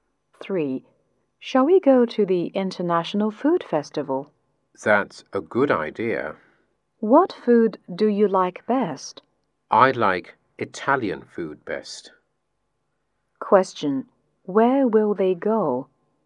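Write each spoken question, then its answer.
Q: Question: Where will they go?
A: The International Food Festival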